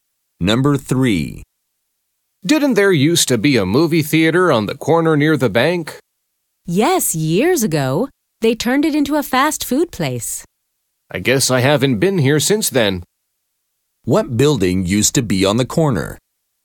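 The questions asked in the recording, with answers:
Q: What building used to be on the corner?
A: A movie theater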